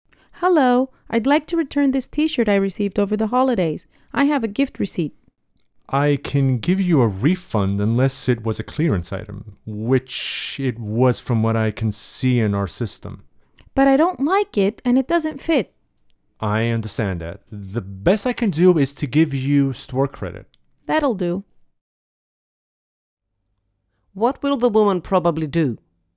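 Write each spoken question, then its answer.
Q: What will the woman probably do?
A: Accept store credit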